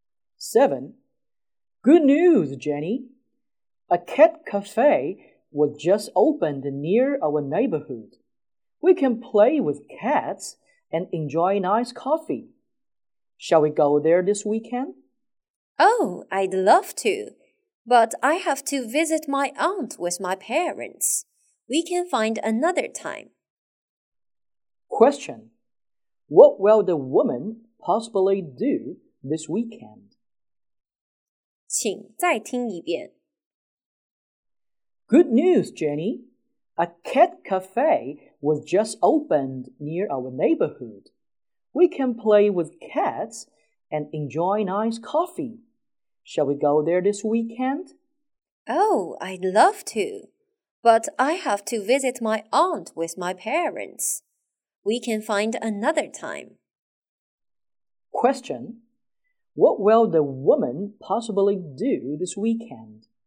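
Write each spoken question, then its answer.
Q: What will the woman possibly do this weekend?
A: Visit her aunt with her parents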